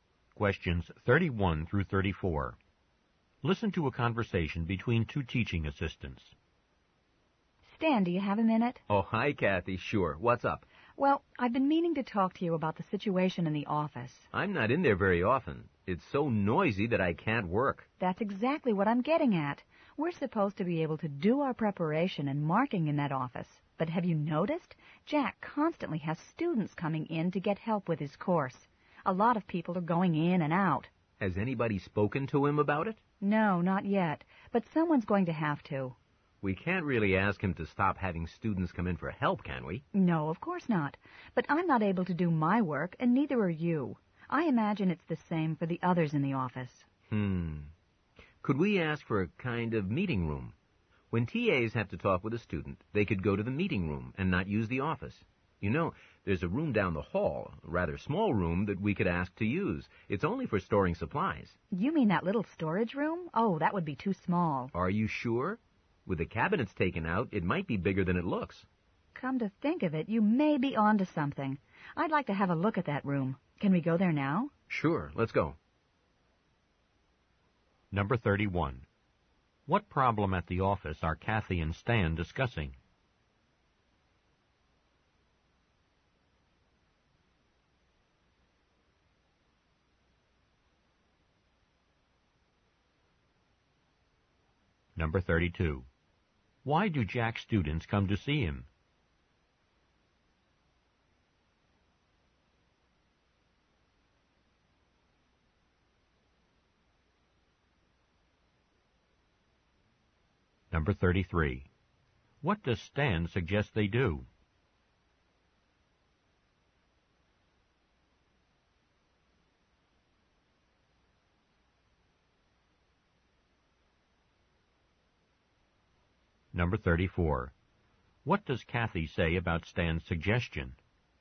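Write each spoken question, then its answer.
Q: What problem at the office are Kathy and Stan discussing?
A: It's too noisy to work because of Jack's students

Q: Why do Jack's students come to see him?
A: To get help with his course

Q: What does Stan suggest they do?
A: Ask for a meeting room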